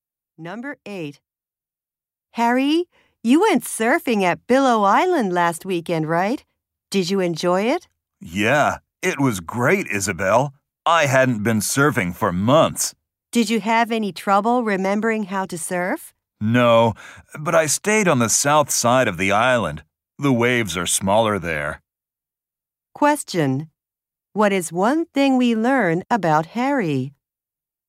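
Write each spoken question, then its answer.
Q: What is one thing we learn about Harry?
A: He surfed where the waves were smaller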